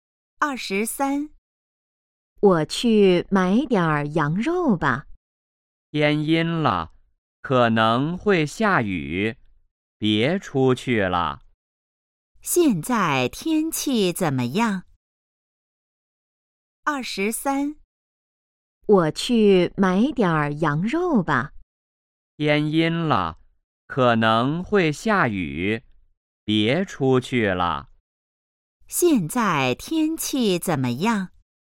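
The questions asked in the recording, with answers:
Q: 现在天气怎么样?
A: 天阴了,可能会下雨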